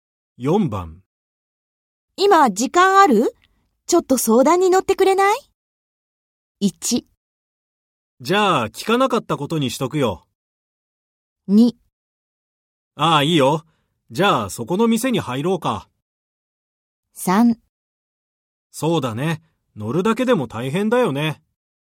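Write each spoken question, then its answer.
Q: 今、時間ある?ちょっと相談に乗ってくれない?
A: 2: ああ、いいよ。じゃあ、そこの店に入ろうか。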